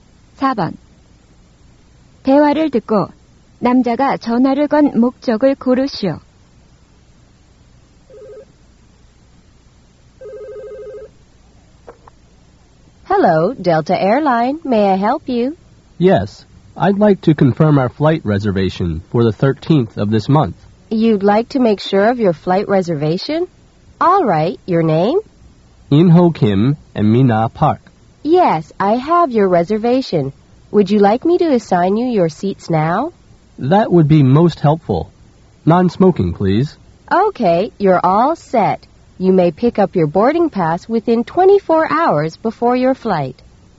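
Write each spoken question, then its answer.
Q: 대화를 듣고 남자가 전화를 건 목적을 고르시오.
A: 항공편 예약을 확인하려고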